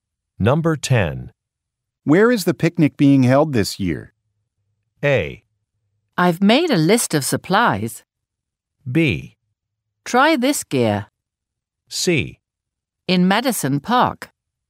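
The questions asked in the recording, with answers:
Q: Where is the picnic being held this year?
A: C: In Madison Park.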